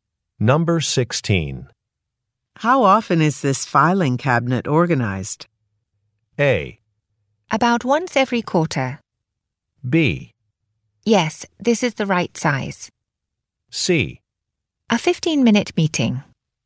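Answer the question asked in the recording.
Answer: A: About once every quarter.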